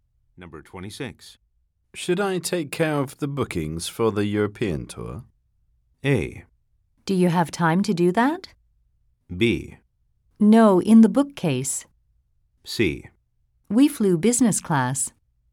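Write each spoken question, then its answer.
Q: Should I take care of the bookings for the European tour?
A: A: Do you have time to do that?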